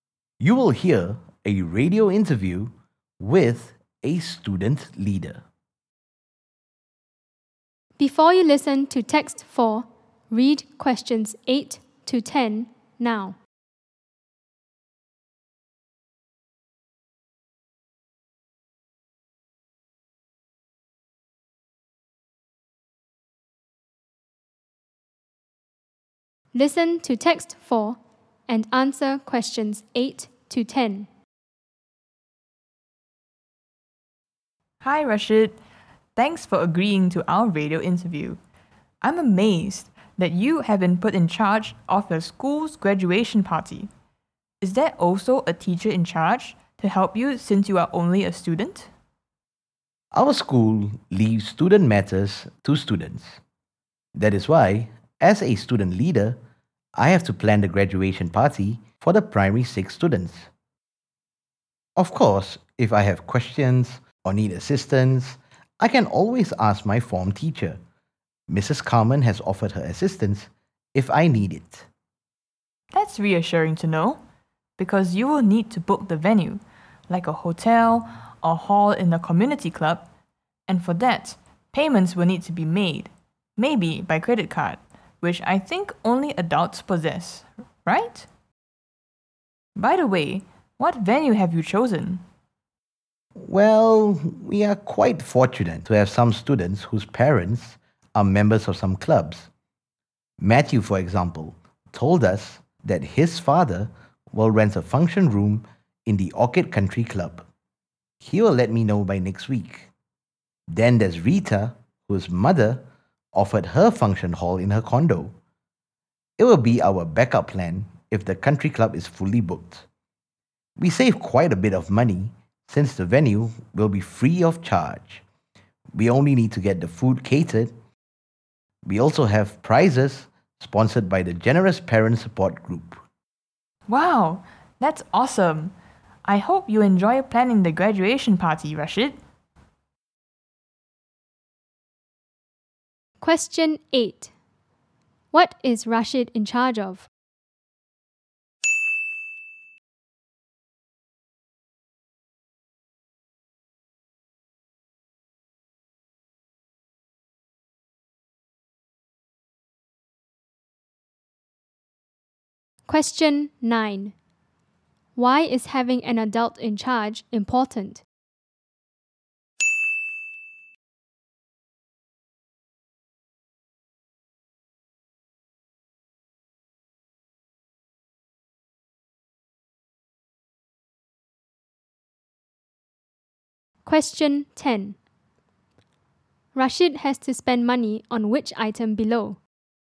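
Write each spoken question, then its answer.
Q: What is Rashid in charge of?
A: the school's graduation party

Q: Why is having an adult in charge important?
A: payments for the venue may need a credit card, which only adults have

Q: Rashid has to spend money on which item below?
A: the food (catering)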